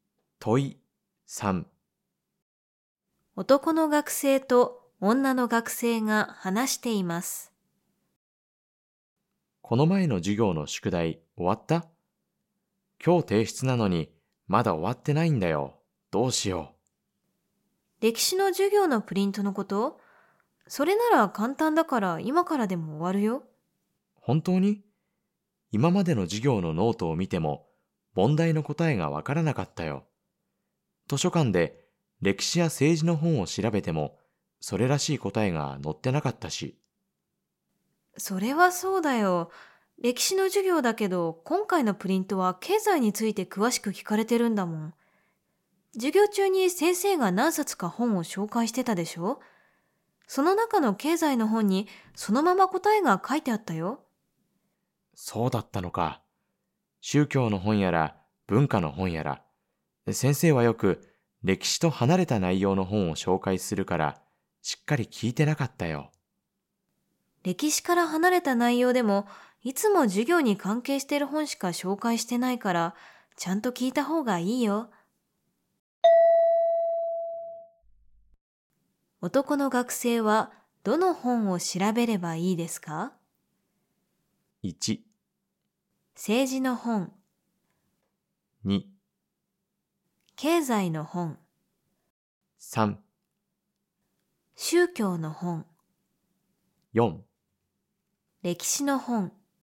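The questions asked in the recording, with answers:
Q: 男の学生はどの本を調べればいいですか?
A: 2: 経済の本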